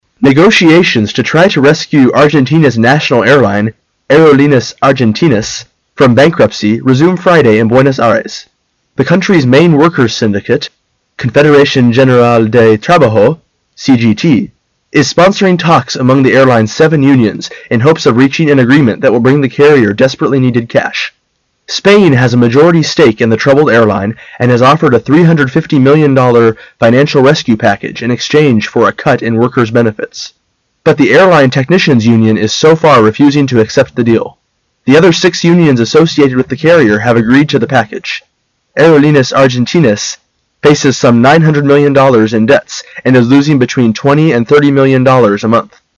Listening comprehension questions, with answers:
Questions 27 and 28 are based on the following news. At the end of the news item, you will be given 10 seconds to answer the two questions. Now listen to the news.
How many unions of the airline accept the financial rescue package offered by Spain?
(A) 1.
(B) 7.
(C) 6.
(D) 5.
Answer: (C) 6.

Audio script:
The country's main workers'syndicate, Confederation General del Trabajo (CGT), is sponsoring talks among the airline's seven unions in hopes of reaching an agreement that will bring the carrier desperately needed cash. Spain has a majority stake in the troubled airline and has offered a $ 350 million financial rescue package in exchange for a cut in workers' benefits. But the airline technicians' union is so far refusing to accept the deal. The other six unions associated with the carrier have agreed to the package. Aerolineas Argentinas faces some $ 900 million in debts and is losing between $ 20-30 million a month.

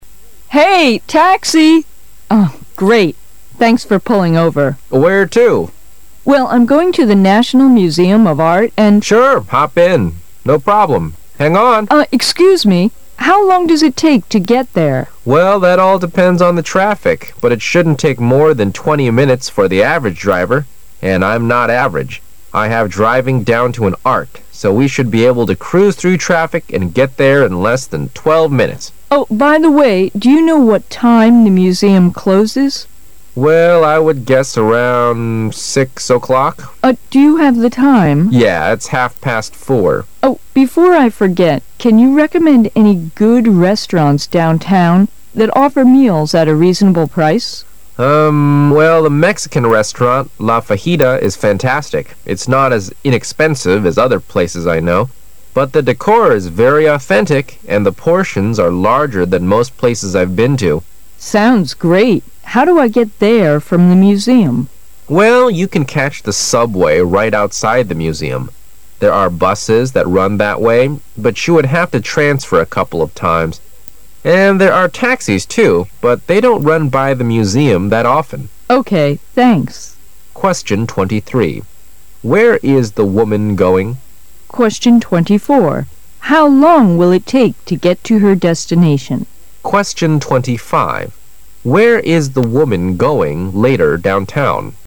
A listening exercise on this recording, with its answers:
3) Where is the woman going later down town?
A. To a party.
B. To a restaurant.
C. To a play.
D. To a business meeting.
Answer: B. To a restaurant.

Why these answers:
对话中can you recommend any good restaurants downtown that offer meals at a reasonable price?以及How do I get there from the museum?两句暗示了对话中女乘客从博物馆出来后要去餐馆用餐,所以选B)。

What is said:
Thanks for pulling over. M: Where to? W: Well, I'm going to the National Museum of Art, and... M: Sure. Hop in. No problem. Hang on! Excuse me. How long does it take to get there? M: Well, that all depends on the traffic ,but it shouldn't take more than twenty minutes for the average driver. And I'm not average. I have driving down to an art, so we should be able to cruise through traffic and get there in less than twelve minutes. W: Oh, by the way, do you know what time the museum closes? M: Well, I would guess around 6:00 o'clock. W: Uh, do you have the time? W: Oh, before I forget, can you recommend any good restaurants downtown that offer meals at a reasonable price? Well, the Mexican restaurant, La Fajita, is fantastic. It's not as inexpensive as other places I know, but the decor is very authentic, and the portions are larger than most places I've been to. W: Sounds great! How do I get there from the museum? M: Well, you can catch the subway fight outside the museum. There are buses that run that way, but you would have to transfer a couple of times. And there are taxis too, but they don't run by the museum that often. W: Okay. Thanks. Where is the woman going?

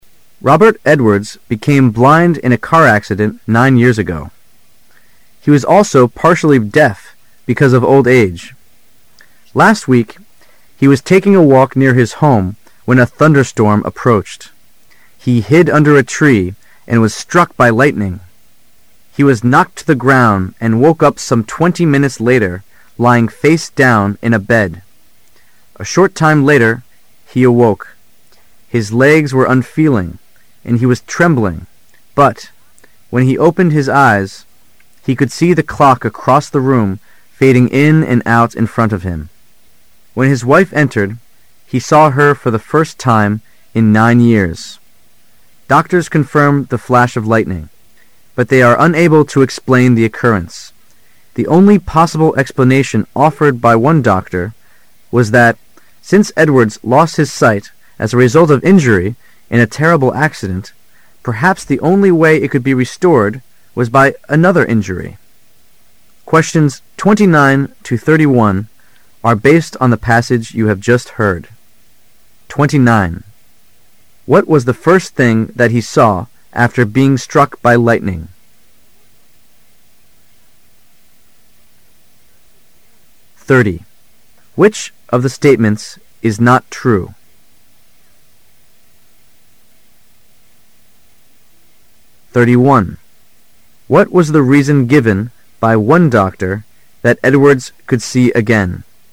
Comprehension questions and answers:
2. Which of the statements is not true?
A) Edwards had been blind for nine years.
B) Edwards was unconscious for twenty minutes after the lightning had struck him.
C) Doctors believe that Edwards was never really blind or deaf.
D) Edwards awoke with his face in a puddle of water.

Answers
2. C) Doctors believe that Edwards was never really blind or deaf.

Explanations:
[试题分析]本题考查考生对全篇文章的综合理解。 [关键词句]Doctors confirm the flash of lightning,but they are unable to explain the occurrence. [详细解答]文章中提到医生们无法解释为什么Edwards的眼睛能在受闪电袭击后能复明,但没有对Edwards的瞎眼和聋耳表示怀疑。故选C。

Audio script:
He was also partially deaf because of old age. Last week, he was taking a walk near his home when a thunderstorm approached. He hid under a tree and was struck by lightning. He was knocked to the ground and woke up some twenty minutes later, lying face down in bed. A short time later, he awoke; his legs were unfeeling and he was trembling, but, when he opened his eyes, he could see the clock across the room fading in and out in front of him. When his wife entered, he saw her for the first time in nine years. Doctors confirm the flash of lightning, but they are unable to explain the occurrence. The only possible explanation offered by one doctor was that, since Edwards lost his sight as a result of injury in a terrible accident, perhaps the only way it could be restored was by another injury. What was the first thing that he saw after being struck by lightning?

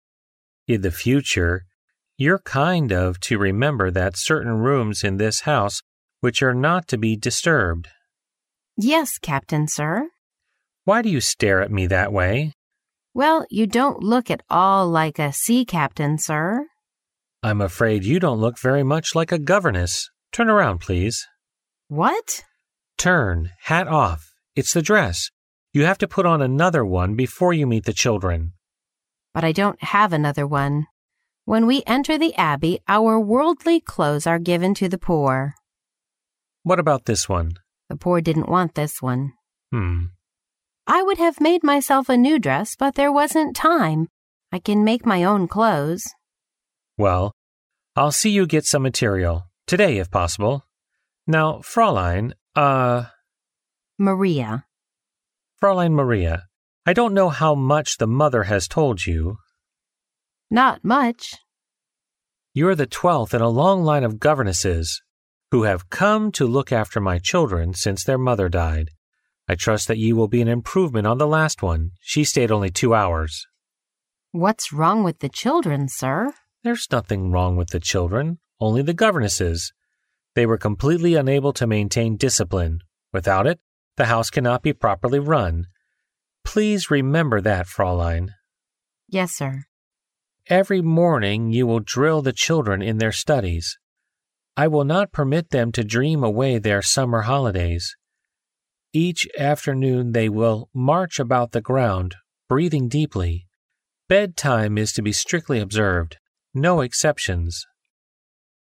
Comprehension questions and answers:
Conversation Two Listen to the conversation. Then read the four choices marked A, B, C and D, and decide which is the best answer according to what you hear.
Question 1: What will the Captain ask Maria to do before she meets the children? ______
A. To change her dress.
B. To have breakfast.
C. To buy some material for making dress.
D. To make a new hat.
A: A. To change her dress.

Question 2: How many governesses had the Captain hired before Maria came? ______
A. Ten.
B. Eleven.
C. Twelve.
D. Thirteen.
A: B. Eleven.

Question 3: What happened to the children's mother? ______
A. She left home.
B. The Captain divorced with her.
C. She died.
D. She was ill.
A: C. She died.

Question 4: Why did the previous governesses leave? ______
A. The salary was too low.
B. The children didn't like them.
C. There was too much work for them to do.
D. They couldn't obey rules the Captain made.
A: D. They couldn't obey rules the Captain made.

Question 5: Which of the following is TRUE? ______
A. Maria left her clothes in the abbey.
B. The Captain hopes that Maria can do better than the last governess.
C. The Captain looked after the children himself.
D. The children need not study in their summer holidays.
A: B. The Captain hopes that Maria can do better than the last governess.

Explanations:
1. 根据录音中Captain的话可知,Maria在见孩子之前需要换一身衣服。因此选A项。
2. 由录音中的"You're the twelfth in a long line of governesses, who have come to look after nay children since their mother died"可知,Maria是被请来的第十二位家庭教师。因此选B项。
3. 由上题可知,这些孩子的母亲已经去世了。因此选C项。
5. 录音中提到,上尉希望Maria比上一个家庭教师做得好。因此选B项。

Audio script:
A
[听力原文] Captain: In the future, you're kind of to remember that certain rooms in this house which are not to be disturbed. Maria: Yes, Captain, sir. Captain: Why do you stare at me that way? Maria: Well, you don't look at all like a sea Captain, sir. Captain: I'm afraid you don't look very much like a governess. Turn around, please. Maria: What? Captain: Turn. Hat off. It's the dress. You have to put on another one before you meet the children. Maria: But I don't have another one. When we enter the abbey, our worldly clothes are given to the poor. Captain: What about this one? Maria: The poor didn't want this one. Captain: Hmm. Maria: I would have made myself a new dress but there wasn't time, I can make my own clothes. Captain: Well, I'll see you get some material. Today, if possible. Maria: Maria. Captain: Fraulein Maria, I don't know how much the Mother has told you. Maria: Not much. Captain: You're the twelfth in a long line of governesses, who have come to look after my children since their mother died. I trust that you will be an improvement on the last one. She stayed only two hours. Maria: What's wrong with the children, sir? Captain: There was nothing wrong with the children, only the governesses. They were completely unable to maintain discipline. Without it, the house cannot be properly run. Please remember that, Fraulein. Maria: Yes, sir. Captain: Every morning you will drill the children in their studies, I will not permit them to dream away their summer holidays. Each afternoon they will march about the ground, breathing deeply. Bed-time is to be strictly observed. No exceptions.

